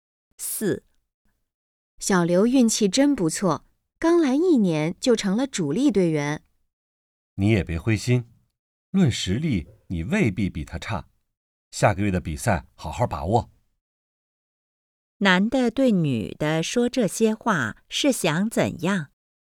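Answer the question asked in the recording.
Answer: 鼓励她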